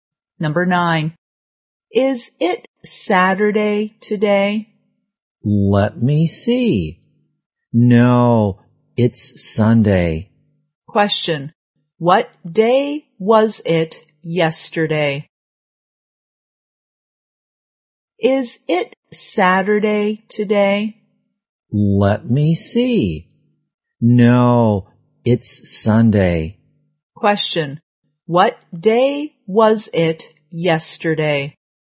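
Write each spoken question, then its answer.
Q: What day was it yesterday?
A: Saturday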